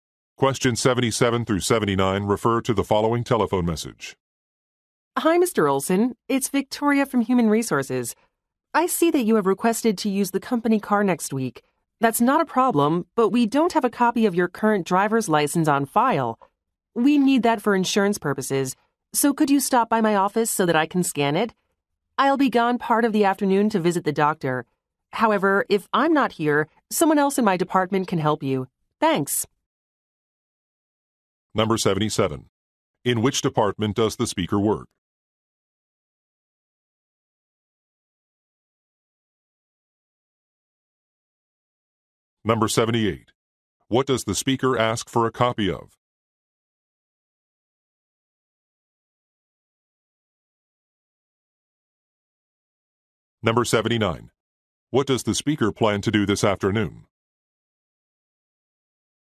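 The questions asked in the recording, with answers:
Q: In which department does the speaker work?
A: Human Resources

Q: What does the speaker ask for a copy of?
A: A driver's license

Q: What does the speaker plan to do this afternoon?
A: Visit the doctor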